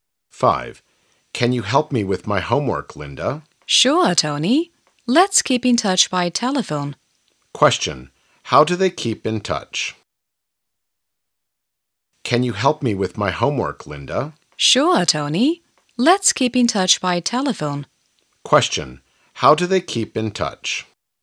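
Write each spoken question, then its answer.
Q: How do they keep in touch?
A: By telephone.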